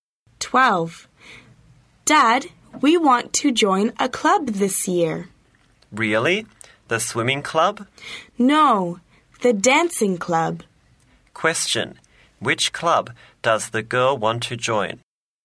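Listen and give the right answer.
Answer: The dancing club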